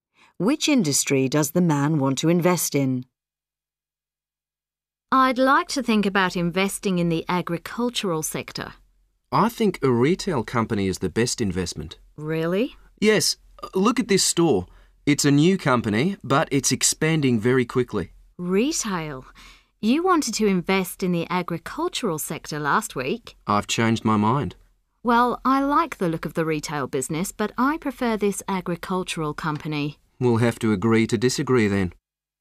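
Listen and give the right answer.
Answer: Retail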